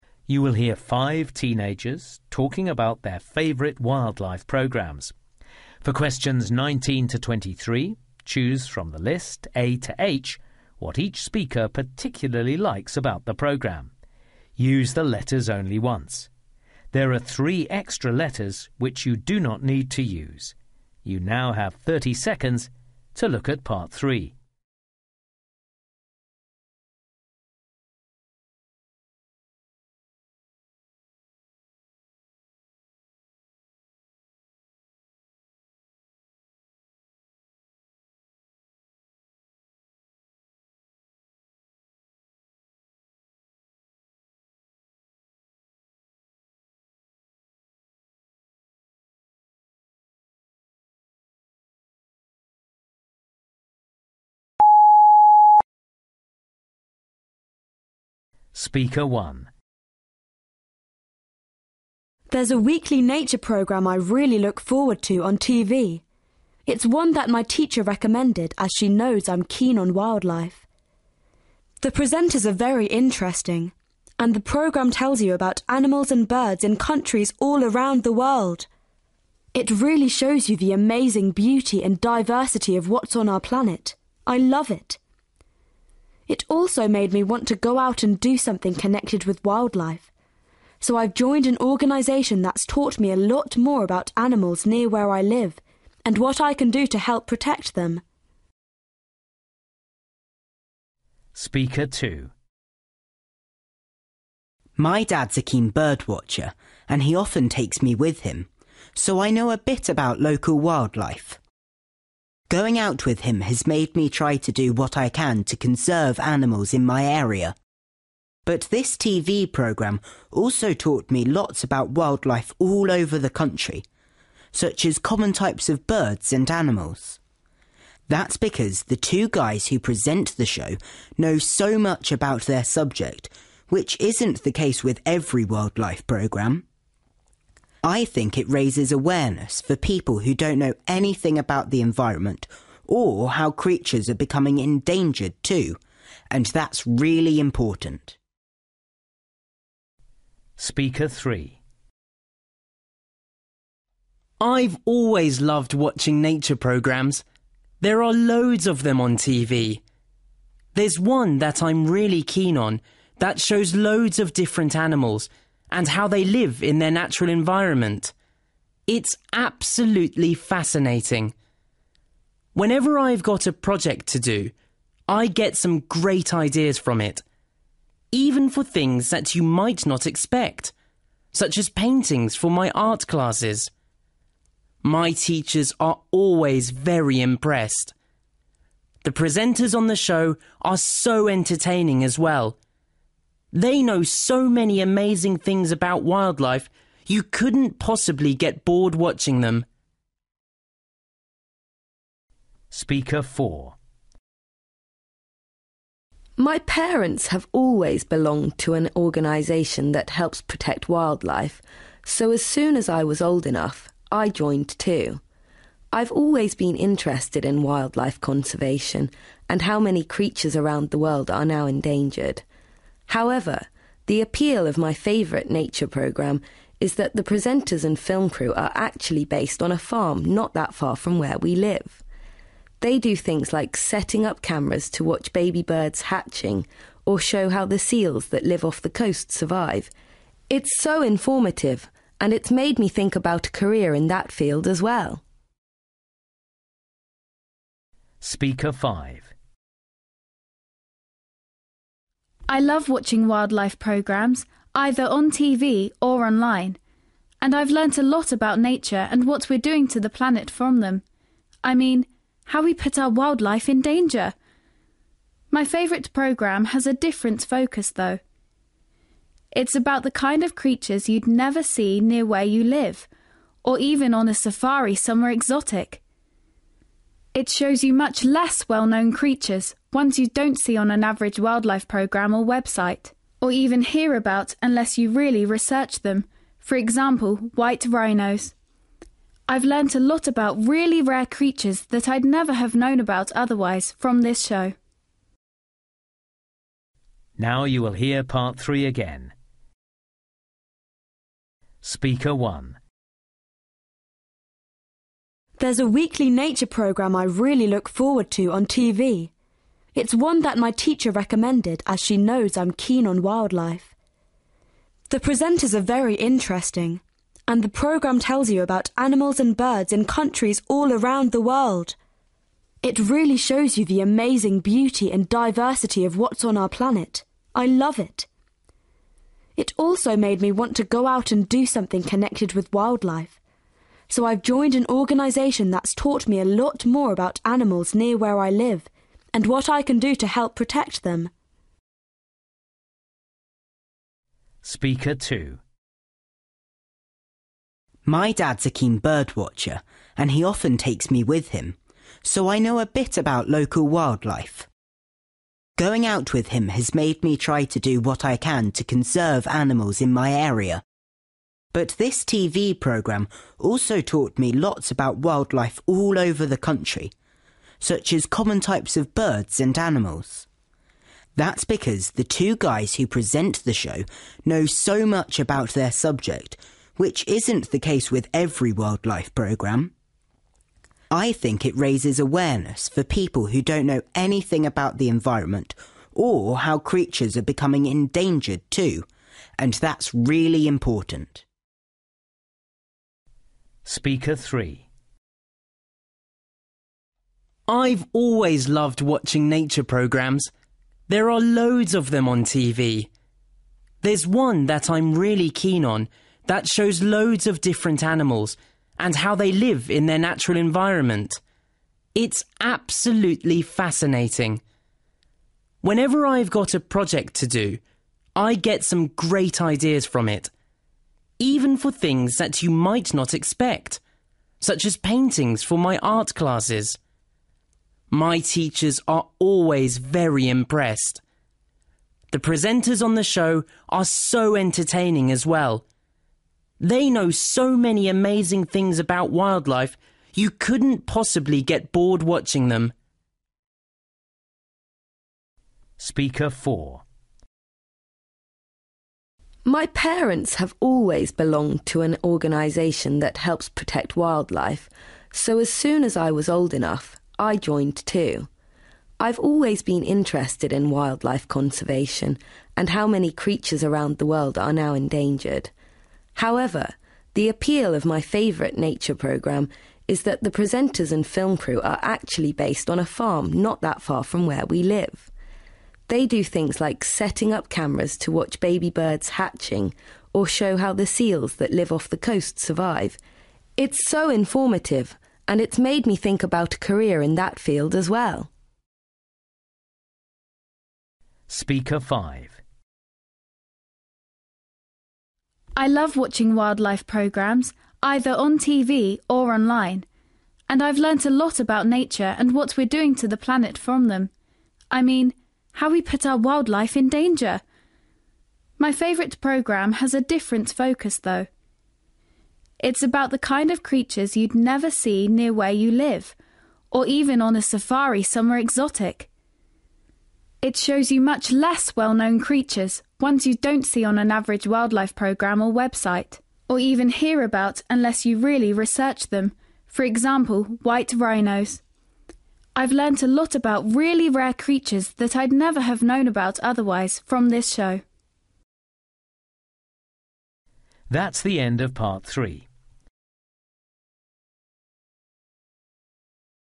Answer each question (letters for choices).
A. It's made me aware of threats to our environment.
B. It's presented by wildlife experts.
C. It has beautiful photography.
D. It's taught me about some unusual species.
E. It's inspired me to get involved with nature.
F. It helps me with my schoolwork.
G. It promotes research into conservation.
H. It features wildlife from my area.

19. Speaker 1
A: E

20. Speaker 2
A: B

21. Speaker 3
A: F

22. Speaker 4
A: H

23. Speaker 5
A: D

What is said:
There's a weekly nature programme I really look forward to on TV – it's one that my teacher recommended, as she knows I'm keen on wildlife. The presenters are very interesting, and the programme tells you about animals and birds in countries all around the world. It really shows you the amazing beauty and diversity of what's on our planet – I love it! It also made me want to go out and do something connected with wildlife, so I've joined an organisation that's taught me a lot more about animals near where I live, and what I can do to help protect them.
My dad's a keen birdwatcher and he often takes me with him, so I know a bit about local wildlife. Going out with him has made me try to do what I can to conserve animals in my area, but this TV programme also taught me lots about wildlife all over the country, such as common types of birds and animals. That's because the two guys who present the show know so much about their subject, which isn't the case with every wildlife programme. I think it raises awareness for people who don't know anything about the environment or how creatures are becoming endangered too, and that's really important.
I've always loved watching nature programmes – there are loads of them on TV. There's one that I'm really keen on that shows loads of different animals and how they live in their natural environment. It's absolutely fascinating. Whenever I've got a project to do, I get some great ideas from it – even for things that you might not expect, such as paintings for my art classes. My teachers are always very impressed! The presenters on the show are so entertaining as well – they know so many amazing things about wildlife, you couldn't possibly get bored watching them.
My parents have always belonged to an organisation that helps protect wildlife, so as soon as I was old enough, I joined too. I've always been interested in wildlife conservation, and how many creatures around the world are now endangered. However, the appeal of my favourite nature programme is that the presenters and film crew are actually based on a farm not that far from where we live. They do things like setting up cameras to watch baby birds hatching, or to show how the seals that live off the coast survive. It's so informative – and it's made me think about a career in that field as well.
I love watching wildlife programmes, either on TV or online, and I've learnt a lot about nature and what we're doing to the planet from them, I mean, how we put our wildlife in danger. My favourite programme has a different focus, though. It's about the kind of creatures you'd never see near where you live, or even on a safari somewhere exotic. It shows you much less well-known creatures, ones you don't see on an average wildlife programme or website, or even hear about unless you really research them, for example, white rhinos. I've learnt a lot about really rare creatures that I'd never have known about otherwise, from this show.

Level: B2